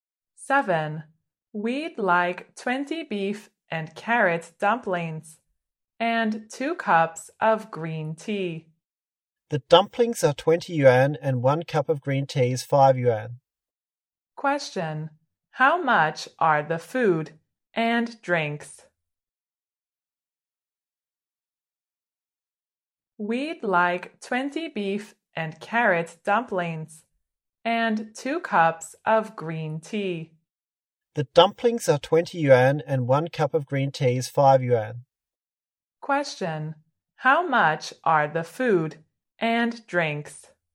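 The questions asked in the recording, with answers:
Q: How much are the food and drinks?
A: 30 yuan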